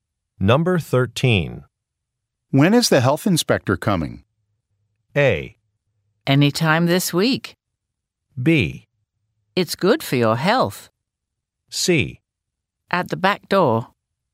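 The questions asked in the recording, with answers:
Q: When is the health inspector coming?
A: A: Anytime this week.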